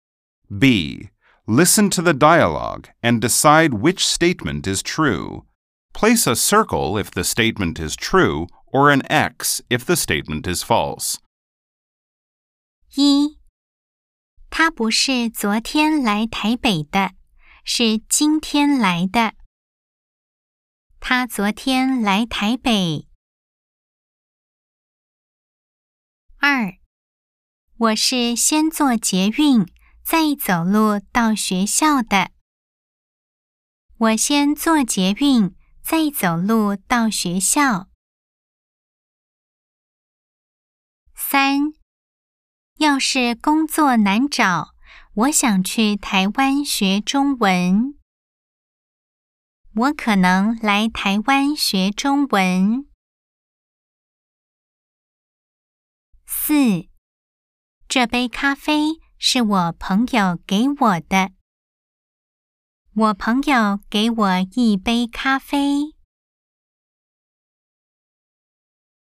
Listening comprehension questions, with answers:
B. Nghe đoạn hội thoại. Đánh dấu ⭕ nếu đúng, ✖ nếu sai 🎧 12-4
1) 他昨天來臺北。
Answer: X

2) 我先做捷运再走路到学校。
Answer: O

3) 我可能來臺灣學中文。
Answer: X

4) 我朋友給我一杯咖啡。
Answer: O